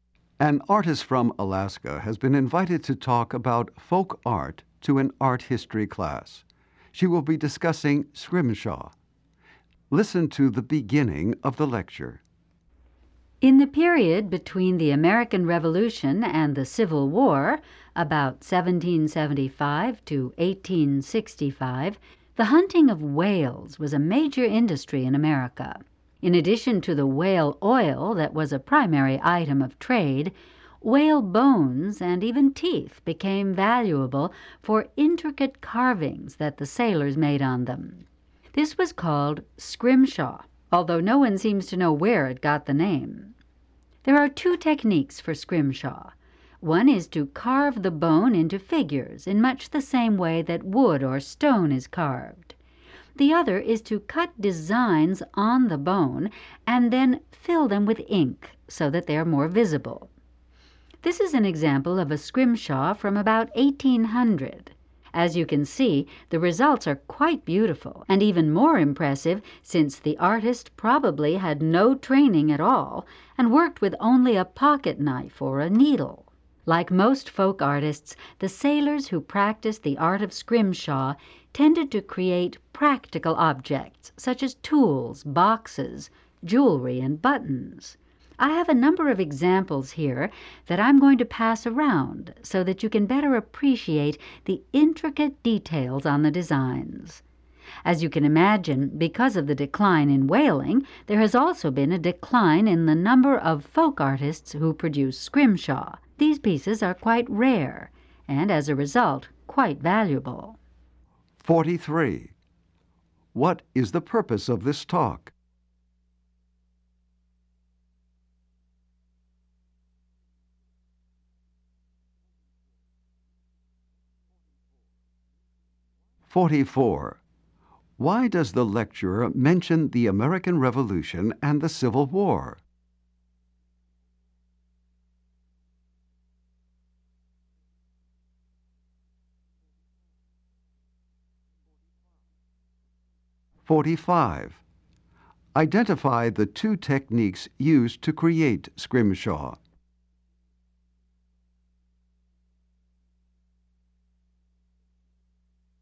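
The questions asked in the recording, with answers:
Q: What is the purpose of this talk?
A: To introduce the folk art of scrimshaw

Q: Why does the lecturer mention the American Revolution and the Civil War?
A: To give the period when whaling was a major industry

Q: Identify the two techniques used to create scrimshaw.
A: Carving the bone into figures, and cutting designs filled with ink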